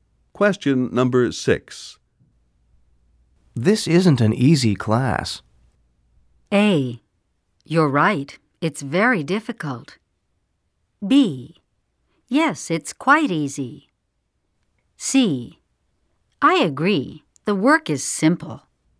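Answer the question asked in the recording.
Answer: A: You're right. It's very difficult.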